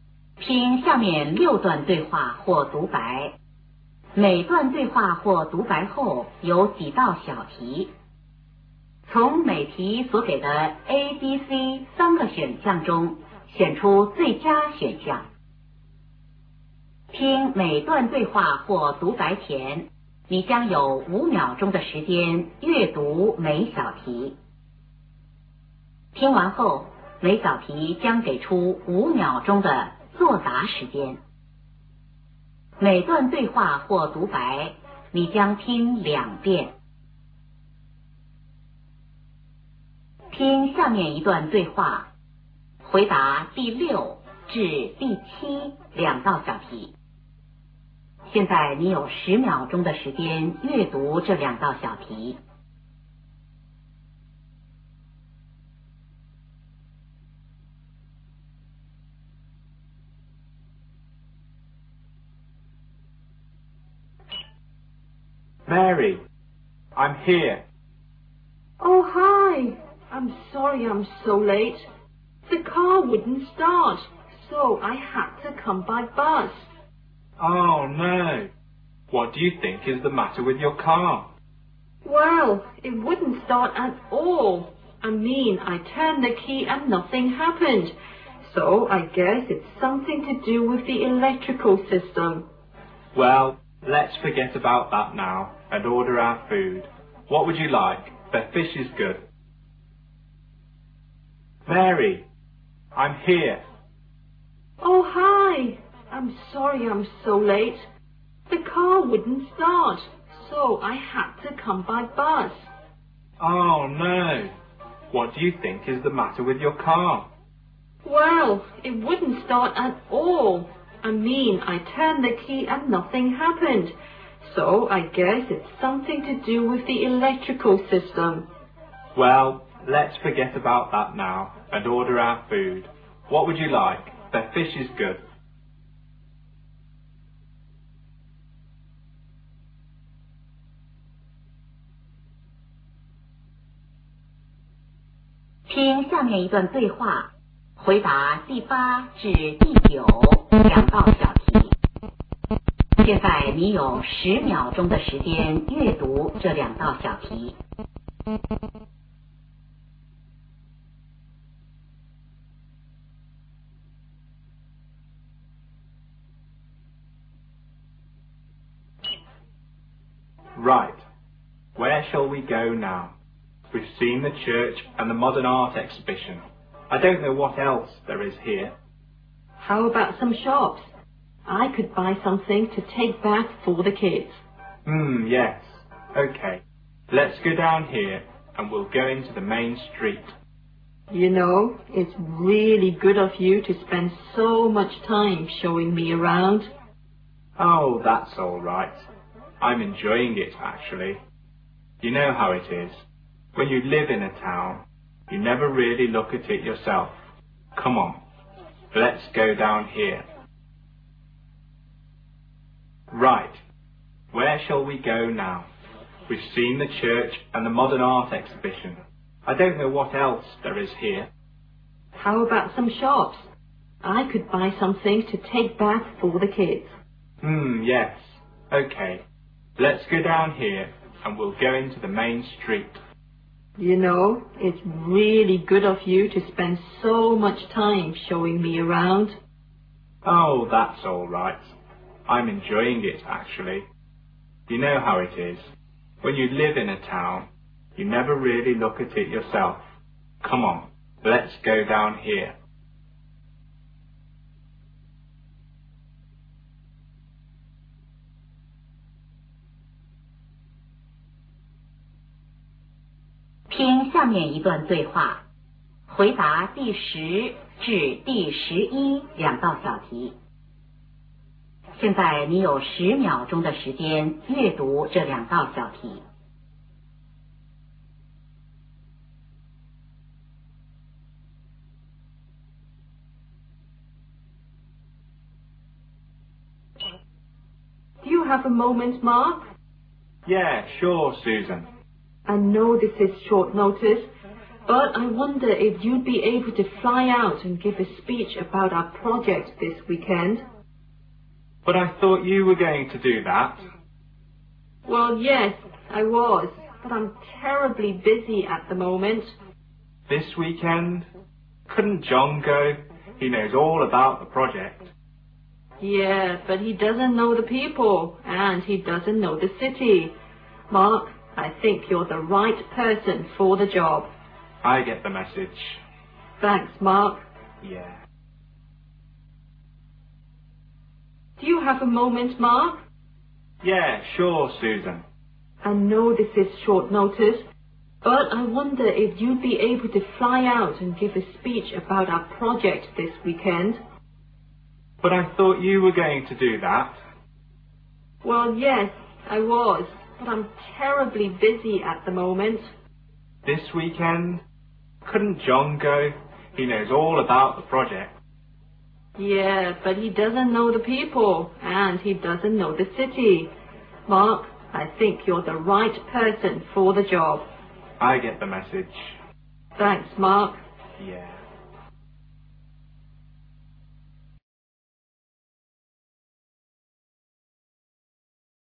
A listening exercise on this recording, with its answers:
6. Why is the woman late?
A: She couldn't start her car.

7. Where are the two speakers?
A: At a restaurant.

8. What are the two speakers going to do?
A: Go shopping.

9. What do we learn about the man?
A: He lives in the city.

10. Who is going to give the speech?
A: Mar.

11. What is the speech about?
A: A project.